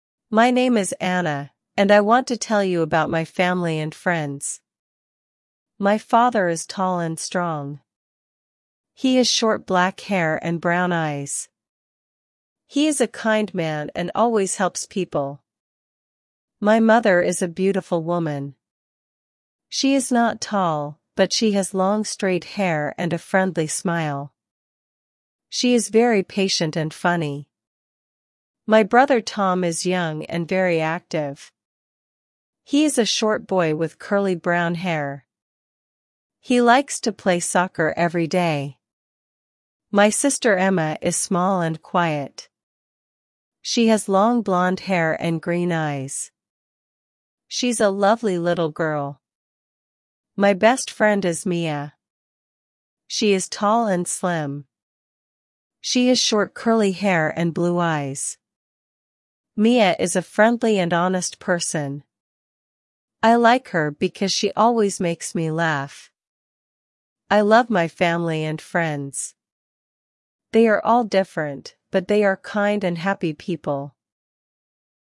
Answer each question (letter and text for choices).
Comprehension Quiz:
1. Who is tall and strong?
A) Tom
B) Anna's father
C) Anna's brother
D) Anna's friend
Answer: B) Anna's father

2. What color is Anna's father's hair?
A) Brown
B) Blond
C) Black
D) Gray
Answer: C) Black

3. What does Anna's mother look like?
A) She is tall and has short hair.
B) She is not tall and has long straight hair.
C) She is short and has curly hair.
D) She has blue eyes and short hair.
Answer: B) She is not tall and has long straight hair.

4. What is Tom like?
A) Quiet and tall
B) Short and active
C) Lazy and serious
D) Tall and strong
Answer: B) Short and active

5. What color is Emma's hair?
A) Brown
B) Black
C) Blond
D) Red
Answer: C) Blond

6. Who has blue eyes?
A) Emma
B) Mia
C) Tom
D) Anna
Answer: B) Mia

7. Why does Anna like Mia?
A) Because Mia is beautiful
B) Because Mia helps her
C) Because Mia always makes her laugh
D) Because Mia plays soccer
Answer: C) Because Mia always makes her laugh

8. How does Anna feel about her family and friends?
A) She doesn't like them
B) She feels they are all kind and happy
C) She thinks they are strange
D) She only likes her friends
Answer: B) She feels they are all kind and happy

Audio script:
My name is Anna, and I want to tell you about my family and friends.
My father is tall and strong. He has short black hair and brown eyes. He is a kind man and always helps people. My mother is a beautiful woman. She is not tall, but she has long straight hair and a friendly smile. She is very patient and funny.
My brother Tom is young and very active. He is a short boy with curly brown hair. He likes to play soccer every day. My sister Emma is small and quiet. She has long blond hair and green eyes. She's a lovely little girl.
My best friend is Mia. She is tall and slim. She has short curly hair and blue eyes. Mia is a friendly and honest person. I like her because she always makes me laugh.
They are all different, but they are kind and happy people